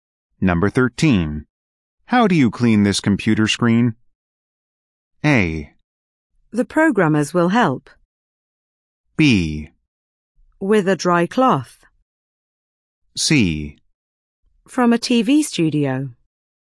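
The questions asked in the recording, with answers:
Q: How do you clean this computer screen?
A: B: With a dry cloth.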